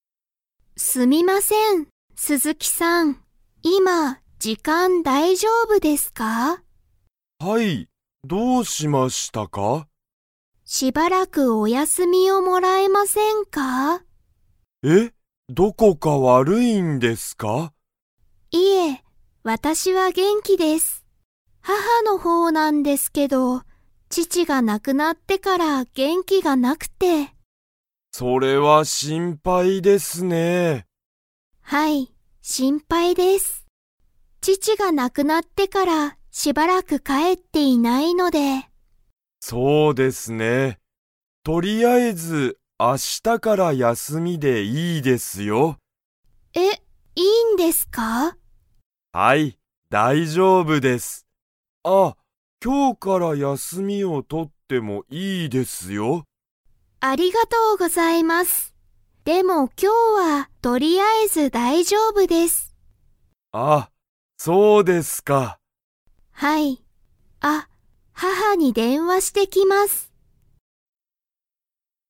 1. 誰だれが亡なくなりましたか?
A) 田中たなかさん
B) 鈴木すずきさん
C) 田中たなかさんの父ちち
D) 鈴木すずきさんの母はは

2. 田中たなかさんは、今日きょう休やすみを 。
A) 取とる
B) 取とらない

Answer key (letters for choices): 1C, 2B

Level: Level 3